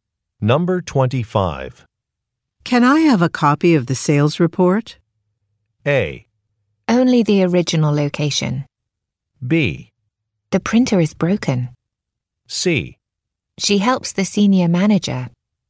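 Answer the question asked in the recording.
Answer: B: The printer is broken.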